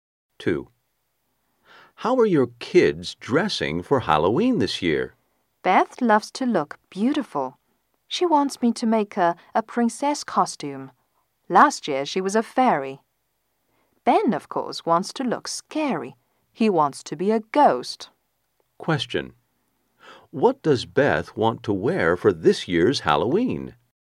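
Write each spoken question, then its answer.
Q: What does Beth want to wear for this year's Halloween?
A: A princess costume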